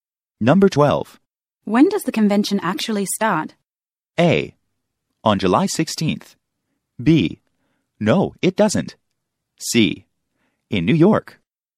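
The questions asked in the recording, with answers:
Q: When does the convention actually start?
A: A: On July 16th.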